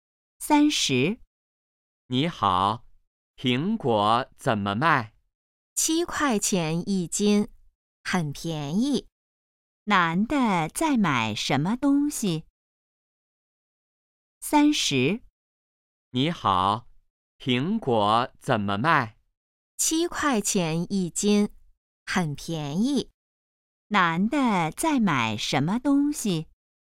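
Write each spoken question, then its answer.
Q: 男的在买什么东西?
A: 苹果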